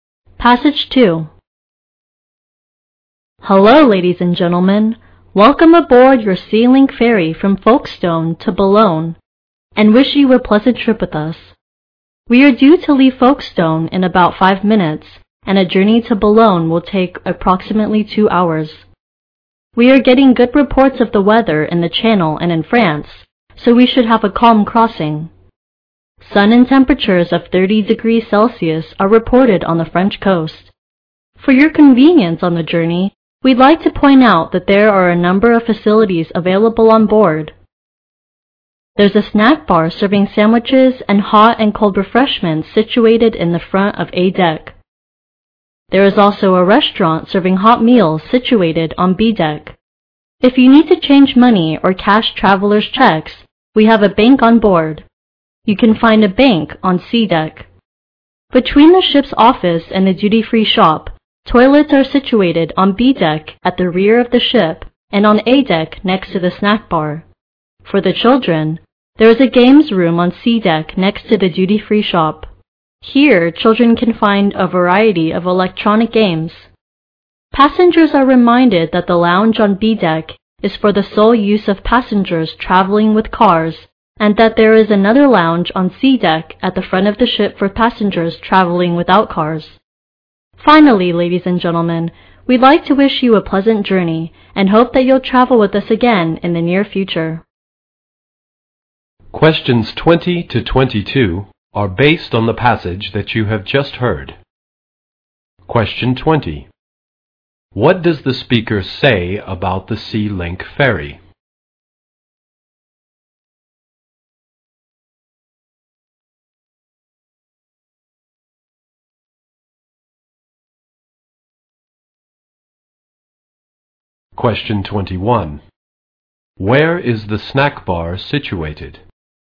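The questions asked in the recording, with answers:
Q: Where is the snack bar situated?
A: At the front of A deck.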